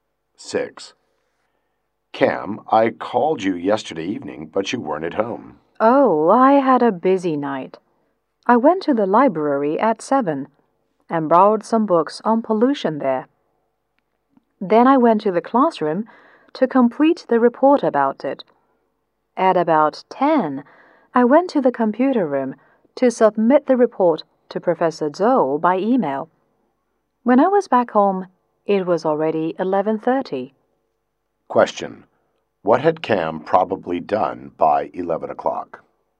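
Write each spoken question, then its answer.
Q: What had Cam probably done by 11 o'clock?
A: Submitted his report to Professor Zhou by email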